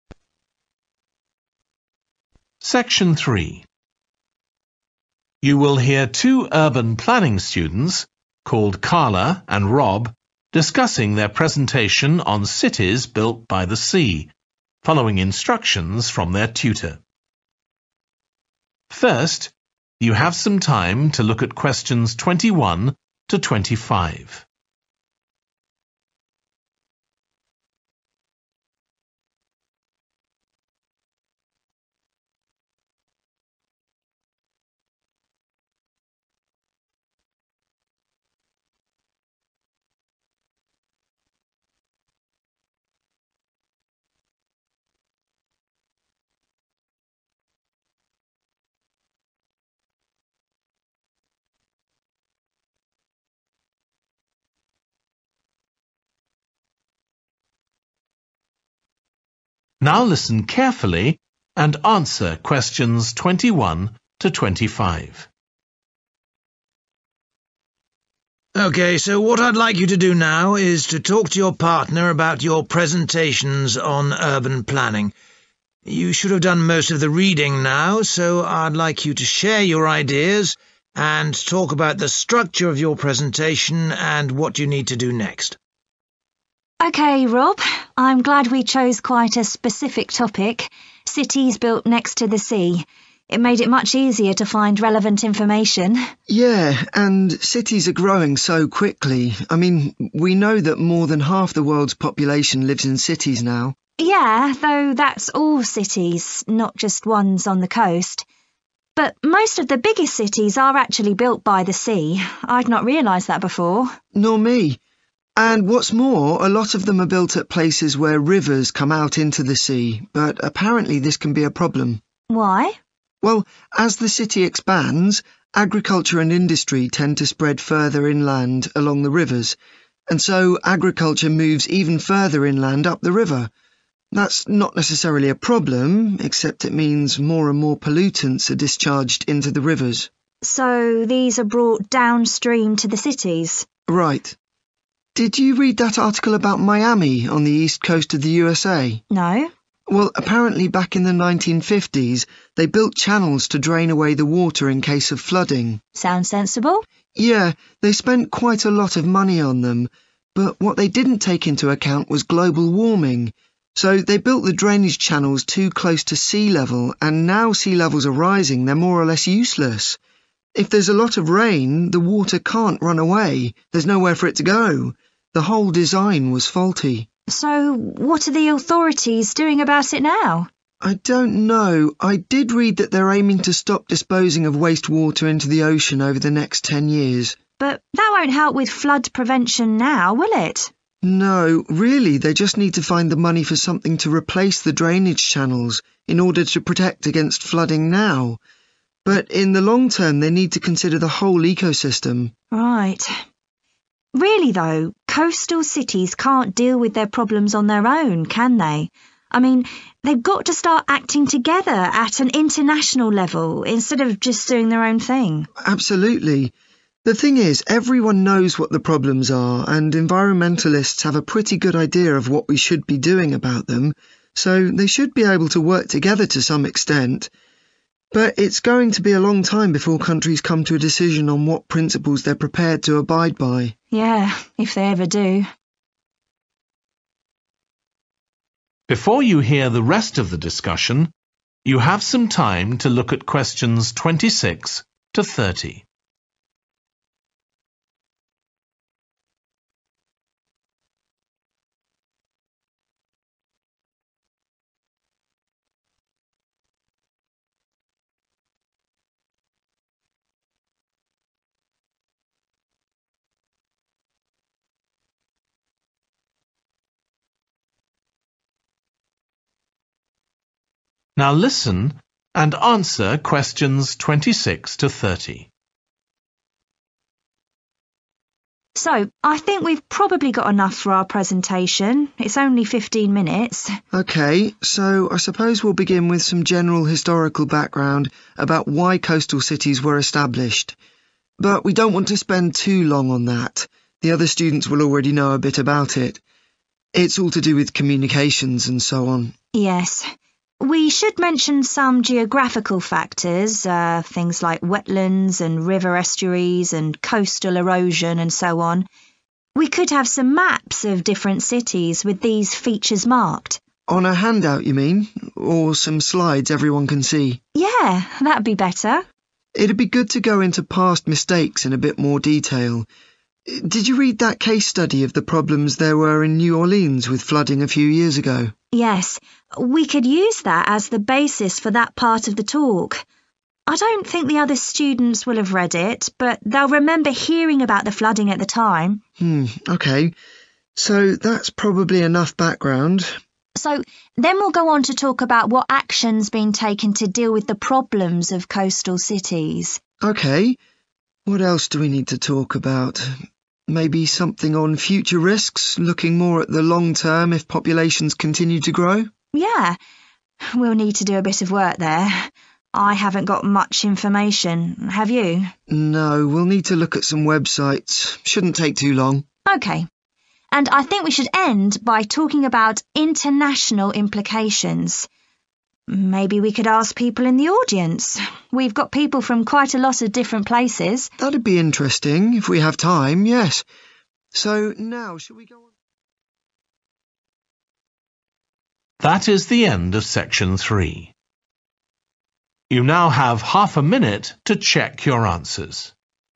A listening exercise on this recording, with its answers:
Choose the correct letter, A, B or C.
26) Historical background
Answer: B. keep it short

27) Geographical factors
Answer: A. use visuals

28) Past mistakes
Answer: F. focus on one example

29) Future risks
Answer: G. do online research

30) International implications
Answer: C. involve other students